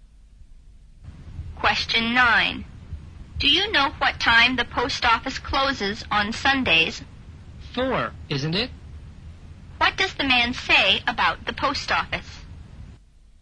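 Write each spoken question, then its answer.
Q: What does the man say about the post office?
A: It closes at 4 on Sundays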